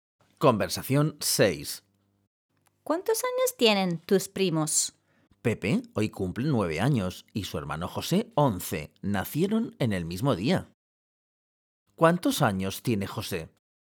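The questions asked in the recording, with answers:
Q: ¿Cuántos años tiene José?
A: 11 años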